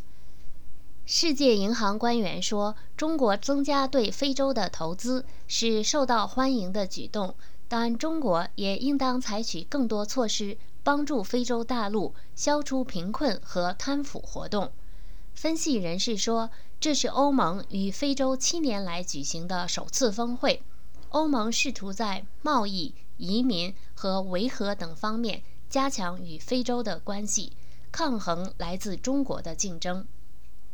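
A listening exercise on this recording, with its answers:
Please answer the following questions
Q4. How do analysts interpret the first EU-African summit for past seven years?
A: The EU is trying to strengthen ties with Africa in trade, migration and peacekeeping to counter competition from China

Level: M.Phil Year 2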